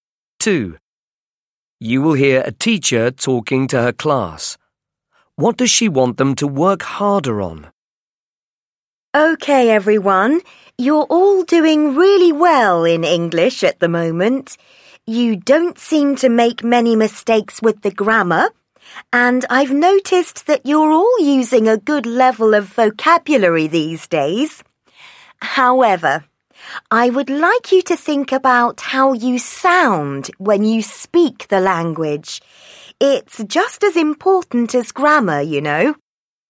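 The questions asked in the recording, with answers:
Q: What does she want them to work harder on?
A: Pronunciation (how they sound when speaking)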